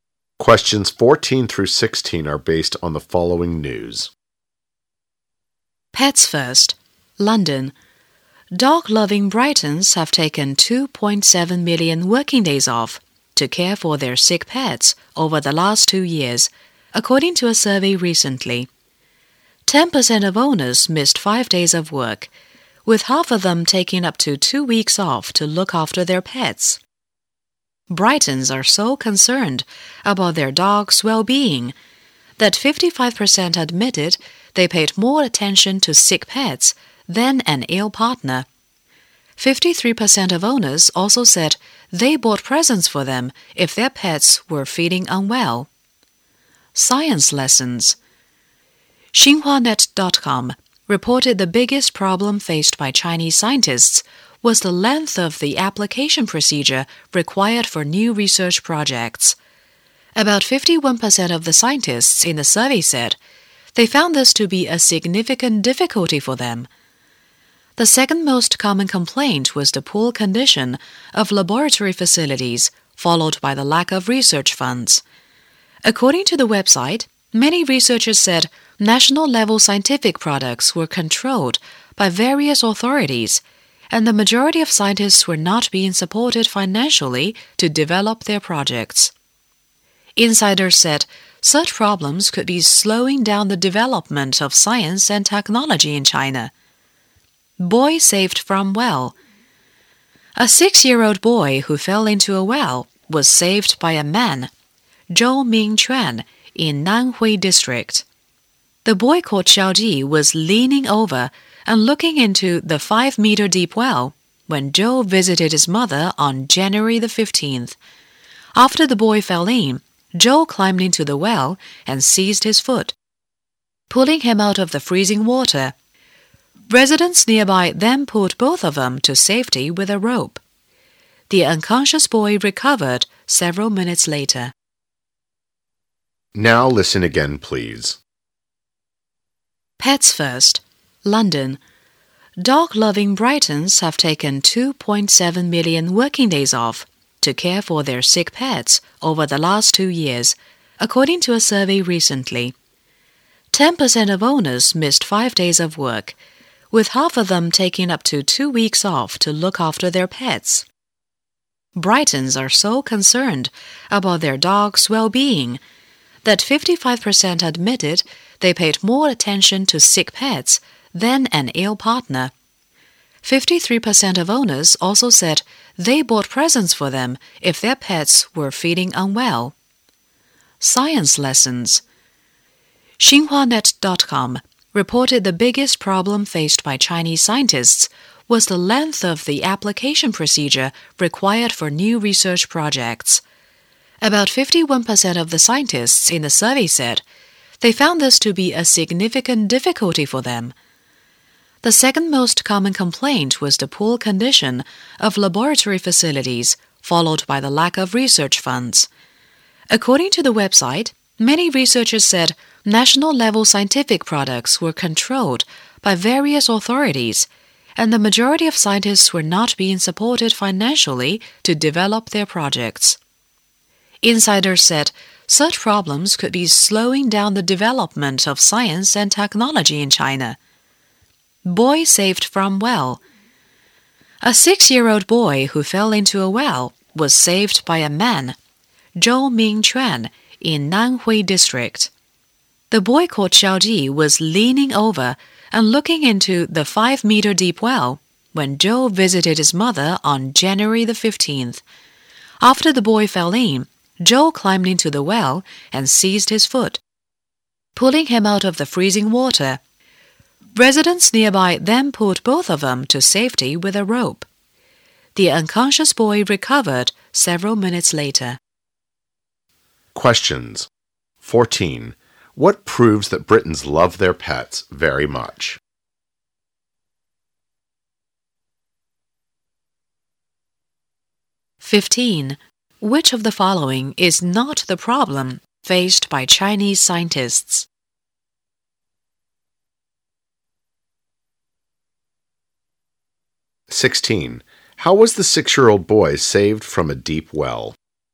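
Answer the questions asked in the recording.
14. They take days off work to care for sick pets and pay them more attention than an ill partner
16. Zhou climbed into the well and grabbed his foot, and residents pulled them both out with a rope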